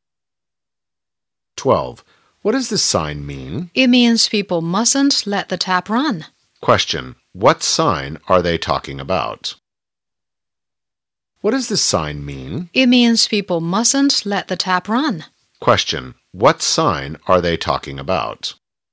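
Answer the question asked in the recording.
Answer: A sign saying not to let the tap run (save water)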